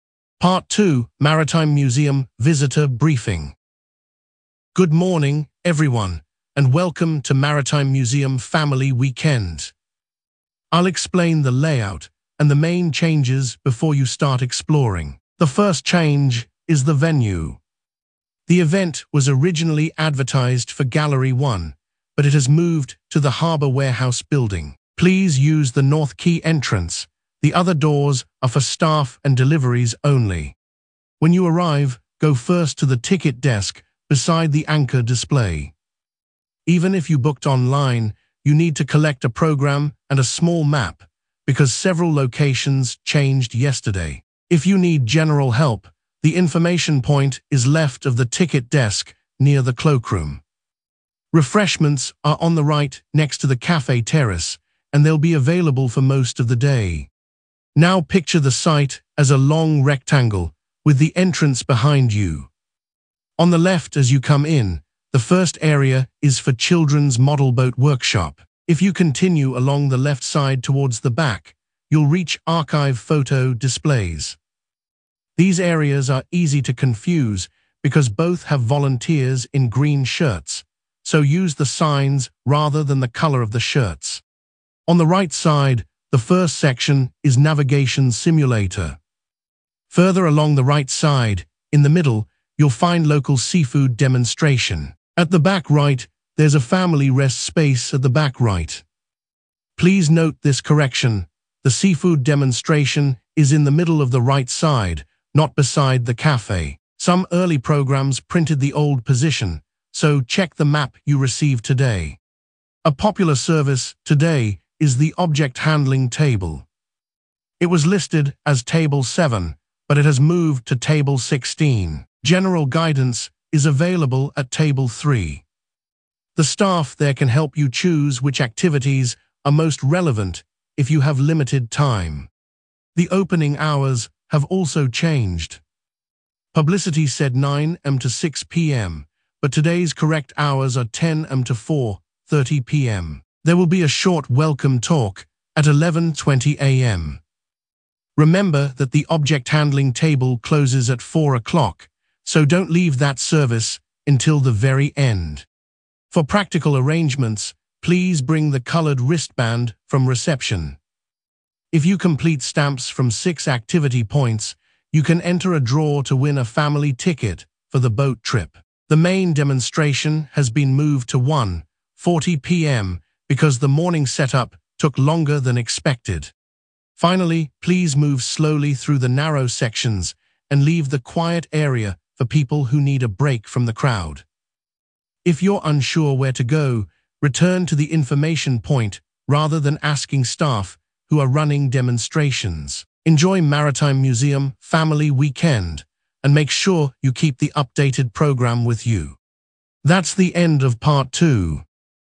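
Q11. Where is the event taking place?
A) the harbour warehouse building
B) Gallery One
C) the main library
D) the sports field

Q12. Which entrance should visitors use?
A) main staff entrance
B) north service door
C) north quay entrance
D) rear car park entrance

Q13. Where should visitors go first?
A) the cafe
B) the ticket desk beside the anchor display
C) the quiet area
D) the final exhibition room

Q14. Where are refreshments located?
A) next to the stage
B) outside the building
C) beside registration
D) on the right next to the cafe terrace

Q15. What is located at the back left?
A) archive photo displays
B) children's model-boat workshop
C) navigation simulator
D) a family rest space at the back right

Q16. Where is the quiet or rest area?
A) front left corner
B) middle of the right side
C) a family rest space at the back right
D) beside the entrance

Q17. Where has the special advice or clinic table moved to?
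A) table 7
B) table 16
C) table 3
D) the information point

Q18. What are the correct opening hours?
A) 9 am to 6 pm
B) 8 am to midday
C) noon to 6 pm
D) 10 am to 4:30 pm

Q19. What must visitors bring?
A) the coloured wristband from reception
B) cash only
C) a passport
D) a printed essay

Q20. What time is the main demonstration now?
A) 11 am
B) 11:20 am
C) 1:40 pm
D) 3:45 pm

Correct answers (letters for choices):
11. A
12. C
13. B
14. D
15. A
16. C
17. B
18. D
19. A
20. C

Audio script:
Part 2: Maritime Museum Visitor Briefing
Guide: Good morning, everyone, and welcome to Maritime Museum Family Weekend. I will explain the layout and the main changes before you start exploring. The first change is the venue. The event was originally advertised for Gallery One, but it has moved to the harbour warehouse building. Please use the north quay entrance; the other doors are for staff and deliveries only.
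Guide: When you arrive, go first to the ticket desk beside the anchor display. Even if you booked online, you need to collect a programme and a small map, because several locations changed yesterday. If you need general help, the information point is left of the ticket desk near the cloakroom. Refreshments are on the right next to the cafe terrace, and they will be available for most of the day.
Guide: Now picture the site as a long rectangle, with the entrance behind you. On the left as you come in, the first area is for children's model-boat workshop. If you continue along the left side towards the back, you will reach archive photo displays. These areas are easy to confuse because both have volunteers in green shirts, so use the signs rather than the colour of the shirts.
Guide: On the right side, the first section is navigation simulator. Further along the right side, in the middle, you will find local seafood demonstration. 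At the back right there is a family rest space at the back right. Please note this correction: the seafood demonstration is in the middle of the right side, not beside the cafe. Some early programmes printed the old position, so check the map you receive today.
Guide: A popular service today is the object-handling table. It was listed as table 7, but it has moved to table 16. General guidance is available at table 3. The staff there can help you choose which activities are most relevant if you have limited time.
Guide: The opening hours have also changed. Publicity said 9 am to 6 pm, but today's correct hours are 10 am to 4:30 pm. There will be a short welcome talk at 11:20 am. Remember that the object-handling table closes at four o'clock, so do not leave that service until the very end.
Guide: For practical arrangements, please bring the coloured wristband from reception. If you complete stamps from six activity points, you can enter a draw to win a family ticket for the boat trip. 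The main demonstration has been moved to 1:40 pm because the morning setup took longer than expected.
Guide: Finally, please move slowly through the narrow sections and leave the quiet area for people who need a break from the crowd. If you are unsure where to go, return to the information point rather than asking staff who are running demonstrations. Enjoy Maritime Museum Family Weekend, and make sure you keep the updated programme with you.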